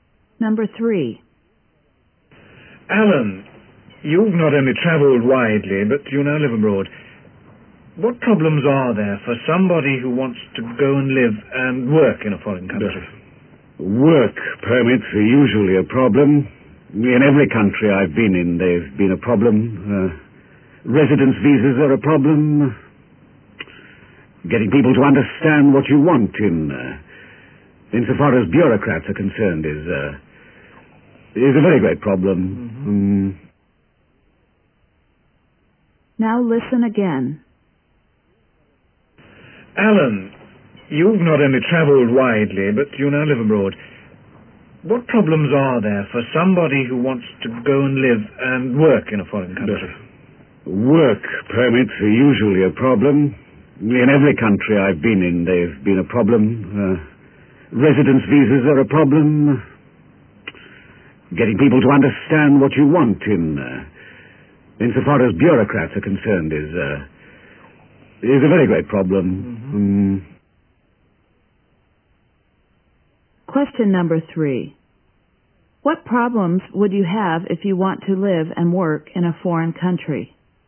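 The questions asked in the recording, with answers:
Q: What problems would you have if you want to live and work in a foreign country?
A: Work permits, residence visas, and getting bureaucrats to understand what you want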